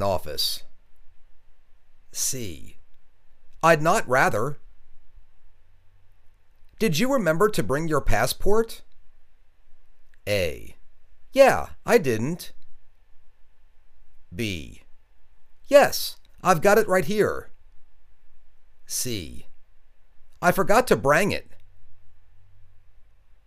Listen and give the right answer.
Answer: Yes, I've got it right here.